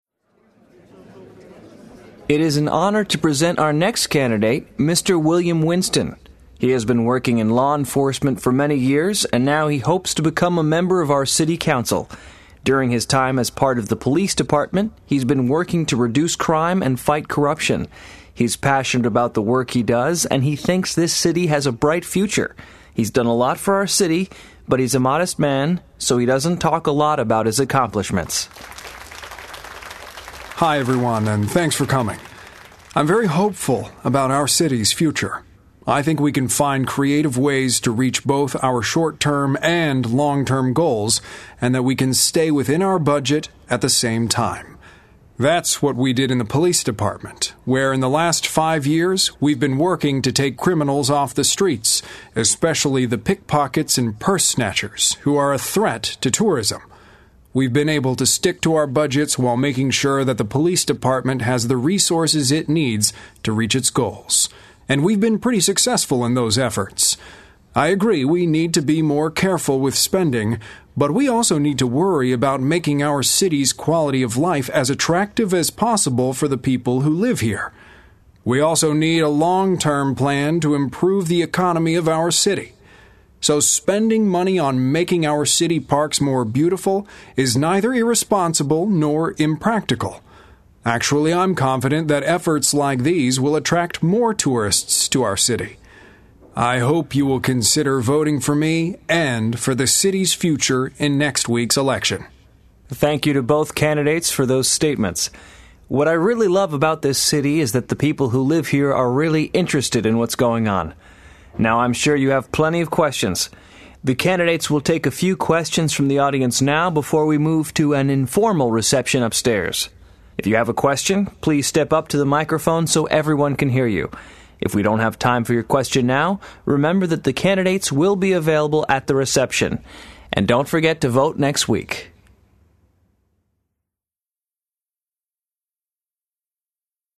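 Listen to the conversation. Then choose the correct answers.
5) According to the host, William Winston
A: has worked in law enforcement for many years, reducing crime and fighting corruption

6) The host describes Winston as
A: passionate and modest

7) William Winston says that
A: spending money on making city parks beautiful is not irresponsible and will attract tourists

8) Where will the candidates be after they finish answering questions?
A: at an informal reception upstairs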